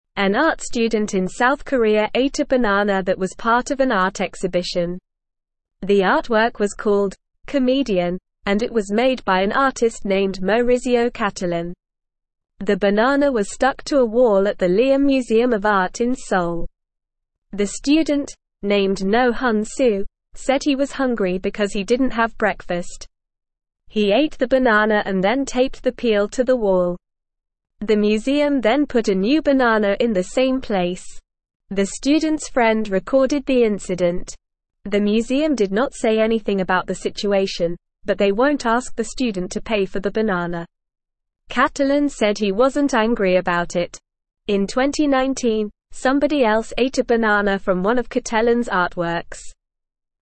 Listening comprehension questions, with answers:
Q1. An art (1)________ in South Korea ate a banana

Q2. The banana was stuck to a (3)________ at the Leeum Museum of Art in Seoul.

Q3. said he was (4)________ because he didn't have breakfast.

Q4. The museum then put a new banana in the same (5)________.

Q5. The student's (6)________ recorded the incident.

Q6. Cattelan said he wasn't (7)________ about it.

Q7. In 2019, somebody else ate a banana from one of Cattelan's (8)________.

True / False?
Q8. An art student in South Korea ate a banana that was part of an art exhibition.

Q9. The artwork was called "Comedian" and it was made by an artist named Maurizio Cattelan.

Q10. The banana was stuck to a floor at the Leeum Museum of Art in Seoul.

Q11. The student, named Noh Huyn-soo, said he was thirsty because he didn't have breakfast.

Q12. The museum put a new banana in the same place.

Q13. The student's friend recorded the incident.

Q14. The museum asked the student to pay for the banana.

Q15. In 2019, nobody ate a banana from one of Cattelan's artworks.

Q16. What did the art student eat at the museum?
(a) an apple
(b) a pizza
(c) a sandwich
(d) a banana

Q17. What was the name of the art installation?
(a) Comedian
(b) Tragedy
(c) Drama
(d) Romance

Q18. Who made the art installation?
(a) Noh Huyn-soo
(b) Maurizio Cattelan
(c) The museum director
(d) The student's friend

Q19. What did the museum do after the student ate the banana?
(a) They scolded the student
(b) They kicked the student out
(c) They put a new banana on the wall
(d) They closed the exhibition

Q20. Did the museum ask the student to pay for the banana?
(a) Yes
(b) No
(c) Maybe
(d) It's not mentioned in the article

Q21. Has anyone else eaten a banana from one of Cattelan's artworks before?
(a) Yes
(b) No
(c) It's not mentioned in the article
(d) The article does not say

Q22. What did the art student in South Korea eat at an art exhibition?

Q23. What was the name of the artwork that had the banana stuck to the wall?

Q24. Did the museum put another banana in the same place?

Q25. Who recorded the incident?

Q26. Will the museum make the student pay for the banana?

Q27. Did the artist get angry about what happened to his artwork?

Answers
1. student
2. wall
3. hungry
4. place
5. friend
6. angry
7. artworks
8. True
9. True
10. False
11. False
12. True
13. True
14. False
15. False
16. (d) a banana
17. (a) Comedian
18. (b) Maurizio Cattelan
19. (c) They put a new banana on the wall
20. (b) No
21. (a) Yes
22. The art student ate a banana.
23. The name of the artwork was "Comedian."
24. Yes, the museum put a new banana in the same place after the student ate the first one.
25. The student's friend recorded the incident.
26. No, the museum won't ask the student to pay for the banana.
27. No, the artist didn't get angry about what happened to his artwork.

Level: Level 1

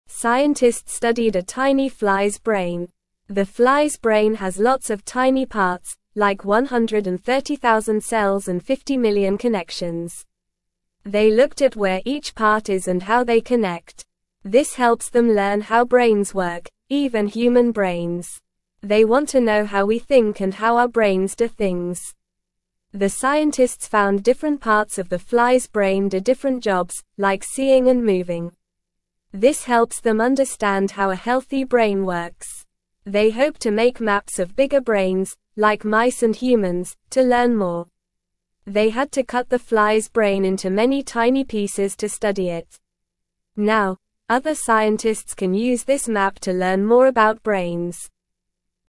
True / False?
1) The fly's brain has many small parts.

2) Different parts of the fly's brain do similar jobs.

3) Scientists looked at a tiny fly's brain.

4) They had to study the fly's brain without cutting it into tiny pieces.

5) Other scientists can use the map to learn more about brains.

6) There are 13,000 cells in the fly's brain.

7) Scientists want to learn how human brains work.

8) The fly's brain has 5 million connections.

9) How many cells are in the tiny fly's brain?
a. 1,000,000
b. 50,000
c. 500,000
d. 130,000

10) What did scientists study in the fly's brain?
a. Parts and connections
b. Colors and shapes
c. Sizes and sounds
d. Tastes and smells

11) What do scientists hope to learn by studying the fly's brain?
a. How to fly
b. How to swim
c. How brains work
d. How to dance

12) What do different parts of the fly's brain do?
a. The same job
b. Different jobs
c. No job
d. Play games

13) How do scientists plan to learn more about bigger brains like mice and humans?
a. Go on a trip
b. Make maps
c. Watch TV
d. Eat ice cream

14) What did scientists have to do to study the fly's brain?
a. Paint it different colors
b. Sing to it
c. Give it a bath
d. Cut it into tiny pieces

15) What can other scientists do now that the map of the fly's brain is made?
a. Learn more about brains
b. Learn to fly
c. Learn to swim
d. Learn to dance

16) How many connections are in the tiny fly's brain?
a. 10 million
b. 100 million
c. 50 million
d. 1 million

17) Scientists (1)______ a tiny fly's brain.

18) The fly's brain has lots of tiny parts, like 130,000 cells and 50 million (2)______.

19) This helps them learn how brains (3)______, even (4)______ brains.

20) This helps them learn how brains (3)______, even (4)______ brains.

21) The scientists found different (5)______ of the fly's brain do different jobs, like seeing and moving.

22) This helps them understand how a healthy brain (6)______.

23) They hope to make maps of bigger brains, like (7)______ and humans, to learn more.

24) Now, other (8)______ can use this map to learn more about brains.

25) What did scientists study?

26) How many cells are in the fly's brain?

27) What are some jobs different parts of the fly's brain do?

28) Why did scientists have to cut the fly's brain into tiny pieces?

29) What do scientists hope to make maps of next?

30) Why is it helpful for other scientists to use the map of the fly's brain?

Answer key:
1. True
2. False
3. True
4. False
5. True
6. False
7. True
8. False
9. d. 130,000
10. a. Parts and connections
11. c. How brains work
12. b. Different jobs
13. b. Make maps
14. d. Cut it into tiny pieces
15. a. Learn more about brains
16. c. 50 million
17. studied
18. connections
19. work
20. human
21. parts
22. works
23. mice
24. scientists
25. Scientists studied a tiny fly's brain.
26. The fly's brain has 130,000 cells.
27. Different parts of the fly's brain do jobs like seeing and moving.
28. Scientists had to cut the fly's brain into tiny pieces to study it better.
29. Scientists hope to make maps of bigger brains like mice and humans.
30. It is helpful for other scientists to use the map of the fly's brain to learn more about brains.

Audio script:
Scientists studied a tiny fly's brain. The fly's brain has lots of tiny parts, like 130,000 cells and 50 million connections. They looked at where each part is and how they connect. This helps them learn how brains work, even human brains. They want to know how we think and how our brains do things.
The scientists found different parts of the fly's brain do different jobs, like seeing and moving. This helps them understand how a healthy brain works. They hope to make maps of bigger brains, like mice and humans, to learn more. They had to cut the fly's brain into many tiny pieces to study it. Now, other scientists can use this map to learn more about brains.

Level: Level 1

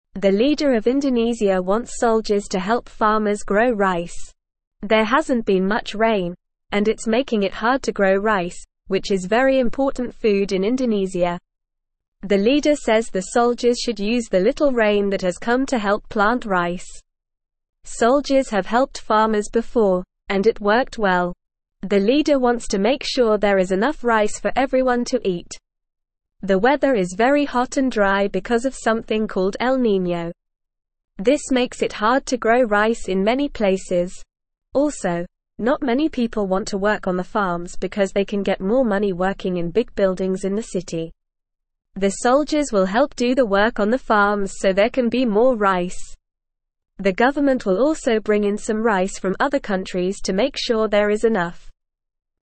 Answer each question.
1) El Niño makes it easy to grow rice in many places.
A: False

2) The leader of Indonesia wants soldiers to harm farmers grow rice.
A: False

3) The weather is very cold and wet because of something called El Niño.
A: False

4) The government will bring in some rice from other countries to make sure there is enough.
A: True

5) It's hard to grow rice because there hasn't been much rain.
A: True

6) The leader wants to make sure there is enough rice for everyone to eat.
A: True

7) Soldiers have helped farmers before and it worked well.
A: True

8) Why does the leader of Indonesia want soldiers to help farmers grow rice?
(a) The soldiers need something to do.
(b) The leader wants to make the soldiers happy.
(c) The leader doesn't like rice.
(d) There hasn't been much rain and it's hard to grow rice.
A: (d) There hasn't been much rain and it's hard to grow rice.

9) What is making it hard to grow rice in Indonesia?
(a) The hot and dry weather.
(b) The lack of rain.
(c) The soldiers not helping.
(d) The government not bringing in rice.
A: (b) The lack of rain.

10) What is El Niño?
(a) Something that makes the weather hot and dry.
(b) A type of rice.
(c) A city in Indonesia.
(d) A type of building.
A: (a) Something that makes the weather hot and dry.

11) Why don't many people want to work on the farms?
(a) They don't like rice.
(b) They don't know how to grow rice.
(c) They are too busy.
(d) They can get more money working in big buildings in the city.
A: (d) They can get more money working in big buildings in the city.

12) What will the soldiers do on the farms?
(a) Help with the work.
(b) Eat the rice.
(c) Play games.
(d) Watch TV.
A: (a) Help with the work.

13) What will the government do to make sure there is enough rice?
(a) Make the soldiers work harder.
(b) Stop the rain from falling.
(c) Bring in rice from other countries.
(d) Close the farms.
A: (c) Bring in rice from other countries.

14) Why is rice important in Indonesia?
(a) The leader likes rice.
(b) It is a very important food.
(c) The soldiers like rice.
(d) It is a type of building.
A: (b) It is a very important food.

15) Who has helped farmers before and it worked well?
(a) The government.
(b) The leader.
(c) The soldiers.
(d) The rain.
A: (c) The soldiers.

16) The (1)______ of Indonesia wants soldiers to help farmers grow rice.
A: leader

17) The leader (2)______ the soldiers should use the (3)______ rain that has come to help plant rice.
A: says

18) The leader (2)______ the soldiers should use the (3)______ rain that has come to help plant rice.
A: little

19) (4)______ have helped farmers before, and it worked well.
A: Soldiers

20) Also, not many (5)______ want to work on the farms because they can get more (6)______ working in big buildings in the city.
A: people

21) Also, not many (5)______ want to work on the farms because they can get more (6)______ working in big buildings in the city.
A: money

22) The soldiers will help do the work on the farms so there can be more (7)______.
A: rice

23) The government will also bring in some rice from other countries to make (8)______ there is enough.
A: sure

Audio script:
The leader of Indonesia wants soldiers to help farmers grow rice. There hasn't been much rain, and it's making it hard to grow rice, which is very important food in Indonesia. The leader says the soldiers should use the little rain that has come to help plant rice.
The weather is very hot and dry because of something called El Niño. This makes it hard to grow rice in many places. Also, not many people want to work on the farms because they can get more money working in big buildings in the city. The soldiers will help do the work on the farms so there can be more rice. The government will also bring in some rice from other countries to make sure there is enough.

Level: Level 1

